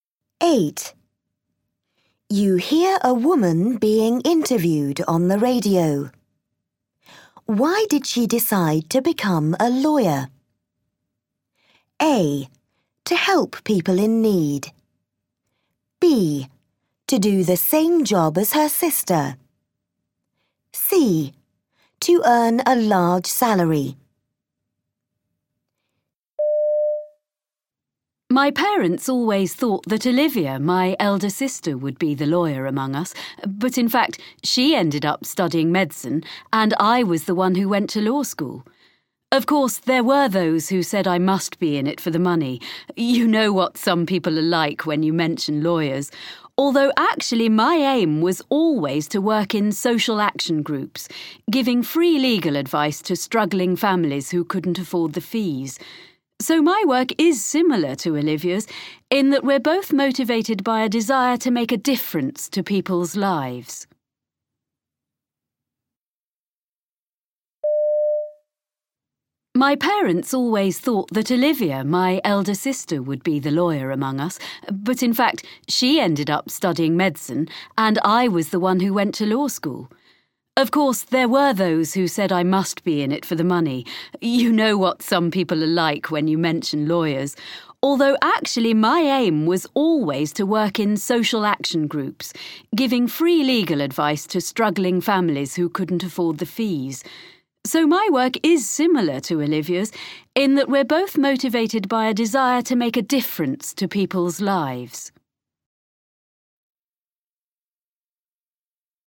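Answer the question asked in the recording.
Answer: A: To help people in need.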